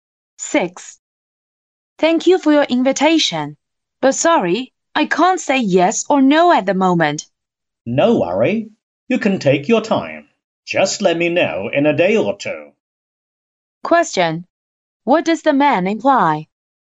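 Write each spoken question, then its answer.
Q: What does the man imply?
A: He can wait a day or two for an answer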